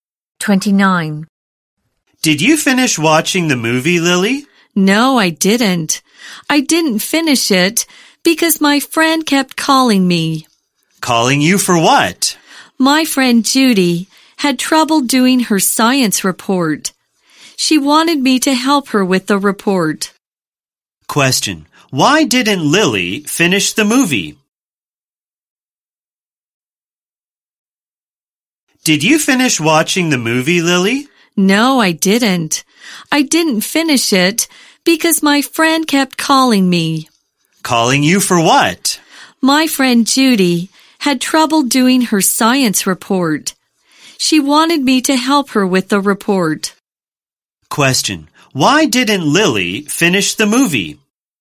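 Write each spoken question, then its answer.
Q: Question. Why didn't Lily finish the movie?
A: Her friend Judy kept calling her for help with a science report.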